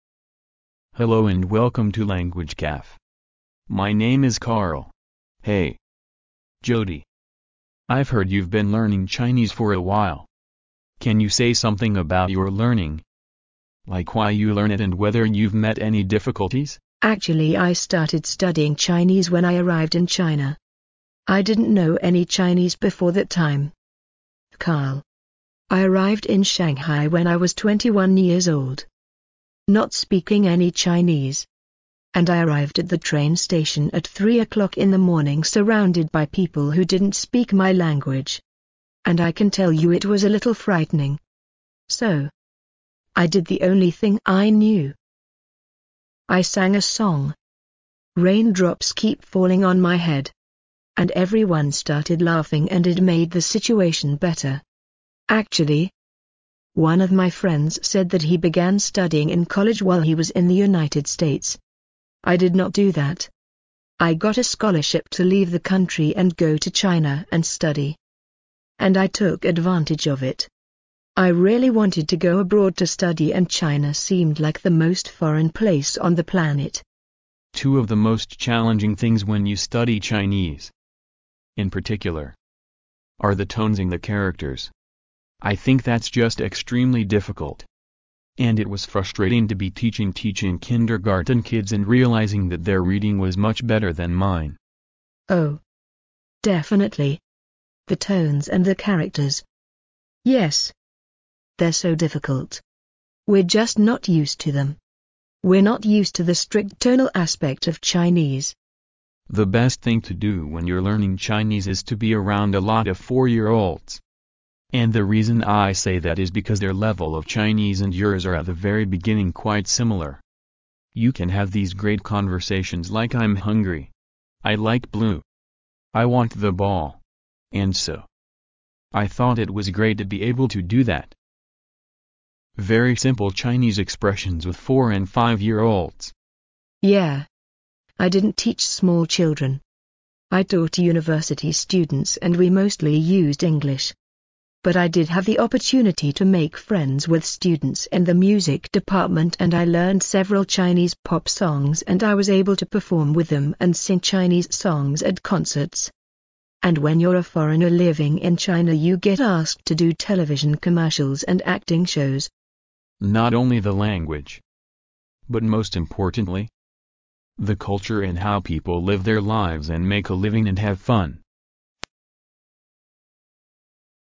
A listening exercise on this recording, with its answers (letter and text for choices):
Listen to the conversation. Then read the four choices marked A, B, C and D, and decide which is the best answer according to what you hear.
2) What was the first thing Jody did when she arrived in Shanghai? ______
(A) She sang an English song to cheer herself up.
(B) She bought an umbrella to keep from the rain.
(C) She tried to ask the way to her university.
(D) She found a place to stay for the night.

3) What did Carl find most challenging in learning Chinese? ______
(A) Pronunciation and word formation.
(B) Reading and writing.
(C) Tones and characters.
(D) Words and phrases.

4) Why did Carl feel frustrated when teaching kindergarten kids? ______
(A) He didn't know how to deal with the kids.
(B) The kids were noisy and made fun of him.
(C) He couldn't communicate with the kids.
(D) The kids were better than him in reading.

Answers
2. (A) She sang an English song to cheer herself up.
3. (C) Tones and characters.
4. (D) The kids were better than him in reading.

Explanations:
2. 题目问当朱迪到达上海后做的第一件事是什么。对话中,女士提到自己在凌晨3点到达上海火车站,做的唯一一件事是唱了一首英文歌"Raindrops Keep Falling on My Head",故选A。
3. 题目问卡尔认为在学习汉语过程中最具挑战性的事是什么。对话中,男士提到"Two of the most challenging things when you study Chinese, in particular, are the tones and the characters"即学习汉语最具挑战性的两件事是音调和汉字,故选C。
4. 题目问为什么卡尔在教幼儿园的孩子时感到沮丧。对话中,男士提到"it was frustrating to be teaching...teaching kindergarten kids and realizing that their reading was much better than mine"由此可见,男士在教幼儿园的孩子时感到沮丧的原因是自己意识到幼儿园孩子的阅读能力比自己好,故选D。

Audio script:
[听力原文] M: Hello and welcome to Language Cafe. My name is Carl! Hey, Jody, I've heard you've been learning Chinese for a while. Can you say something about your learning, like why you learn it and whether you've met any difficulties? W: Actually I start.ed studying Chinese when I arrived in China. I didn't know any Chinese before that time, Carl. I arrived in Shanghai when I was 21 years old, not speaking any Chinese. And I arrived at the train station at 3 o'clock in the morning surrounded by people who didn't speak my language. And I can tell you it was a little frightening. So, I did the only thing I knew...l sang a song, "Rain drops Keep Falling on My Head". And everyone started laughing and it made the situation better. Actually, one of my friends said that he began studying in college while he was in the United States. I did not do that. I got a scholarship to leave the country and go to China and study, and I took advantage of it. I really wanted to go abroad to study and China seemed like the most foreign place on the planet. M: Two of the most challenging things when y-ou study Chinese, in particular, are the tones and the characters. I think that's just extremely difficult. And it was frustrating to be teaching...teaching kindergarten kids and realizing that their reading was much better than mine. W: Oh, definitely. The tones and the characters, yes, they're so difficult. We're just not used to them. We're not used to the strict tonal aspect of Chinese. M: The best thing to do when you're learning Chinese is to be around a lot of four-year-olds. And the reason I say that is because their level of Chinese and yours are at the very beginning quite similar. You can have these great conversations like "I'm hungry!" "I like blue." "I want the ball!" And so, I thought it was great to be able to do that...very simple Chinese expressions with four and five-year-olds. W: Yeah. I didn't teach small children. I taught university students and we mostly used English. But I did have the opportunity to make friends with students in the music department and I learned several Chinese pop songs and I was able to perform with them and sing Chinese songs at concerts. And when you're a foreigner living in China you get asked to do television commercials and acting shows. M: Not only the language, but most importantly, the culture and how people live their lives and make a living and have fun.